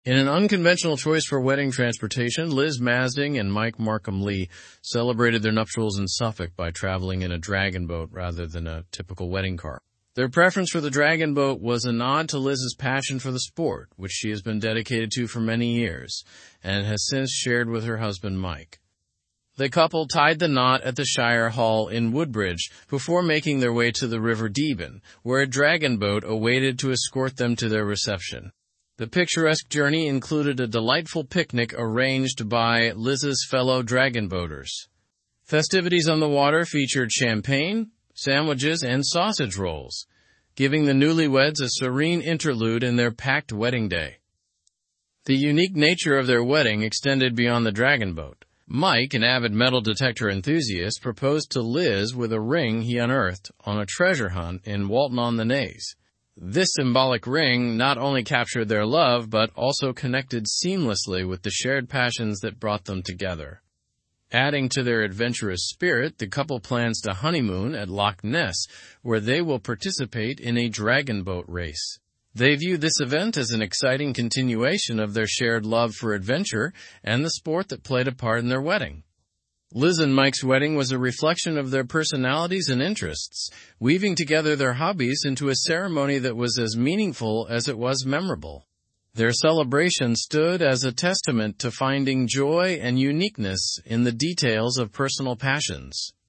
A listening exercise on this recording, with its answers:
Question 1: What unusual choice did Liz and Mike make for their wedding transportation?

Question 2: Where did the couple get married?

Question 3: What did the wedding picnic include?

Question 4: What hobby is Mike passionate about?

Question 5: How did Mike propose to Liz?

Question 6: Where are Liz and Mike planning to honeymoon?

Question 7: What shared activity do they plan to do on their honeymoon?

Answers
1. They chose a dragon boat instead of a traditional wedding car.
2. They got married at the Shire Hall in Woodbridge.
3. The picnic included sandwiches, champagne, and sausage rolls.
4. Mike is passionate about metal detecting.
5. He proposed with a ring he discovered on a treasure hunt.
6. They plan to honeymoon at Loch Ness.
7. They plan to participate in a dragon boat race.

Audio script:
In an unconventional choice for wedding transportation, Liz Masding and Mike Markham-Lee celebrated their nuptials in Suffolk by traveling in a dragon boat rather than a typical wedding car. Their preference for the dragon boat was a nod to Liz's passion for the sport, which she has been dedicated to for many years and has since shared with her husband Mike.
The couple tied the knot at the Shire Hall in Woodbridge before making their way to the River Deben, where a dragon boat awaited to escort them to their reception. The picturesque journey included a delightful picnic arranged by Liz's fellow dragon boaters. Festivities on the water featured champagne, sandwiches, and sausage rolls, giving the newlyweds a serene interlude in their packed wedding day.
The unique nature of their wedding extended beyond the dragon boat. Mike, an avid metal detector enthusiast, proposed to Liz with a ring he unearthed on a treasure hunt in Walton-on-the-Naze. This symbolic ring not only captured their love but also connected seamlessly with the shared passions that brought them together.
Adding to their adventurous spirit, the couple plans to honeymoon at Loch Ness, where they will participate in a dragon boat race. They view this event as an exciting continuation of their shared love for adventure and the sport that played a part in their wedding.
Liz and Mike's wedding was a reflection of their personalities and interests, weaving together their hobbies into a ceremony that was as meaningful as it was memorable. Their celebration stood as a testament to finding joy and uniqueness in the details of personal passions.

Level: Level 4